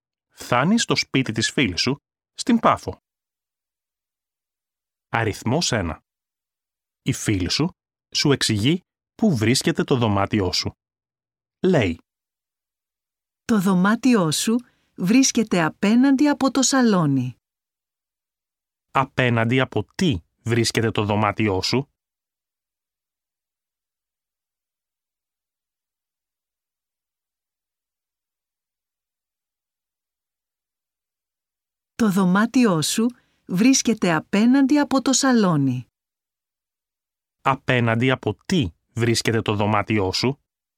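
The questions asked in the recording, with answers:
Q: Απέναντι από τι βρίσκεται το δωμάτιό σου?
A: Απέναντι από το σαλόνι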